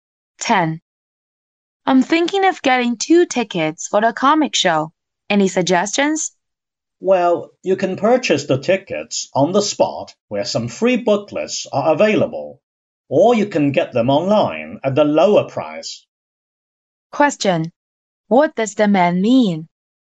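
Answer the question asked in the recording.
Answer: Buying tickets online is cheaper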